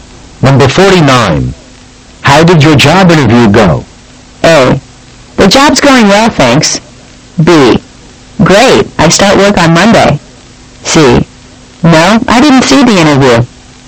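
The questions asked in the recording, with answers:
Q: How did your job interview go?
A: B: Great, I start work on Monday.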